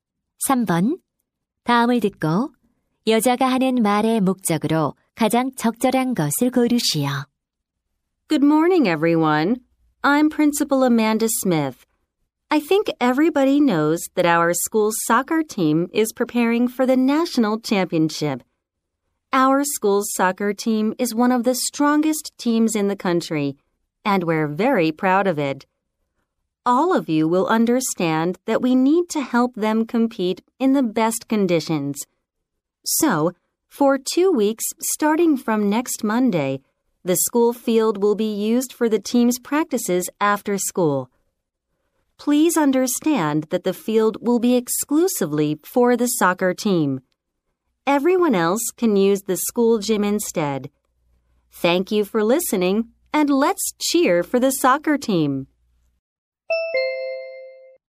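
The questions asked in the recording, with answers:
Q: 다음을 듣고 여자가 하는 말의 목적으로 가장 적절한 것을 고르시오.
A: 다음 주 월요일부터 2주간 학교 운동장을 축구부 연습 전용으로 사용함을 알리려고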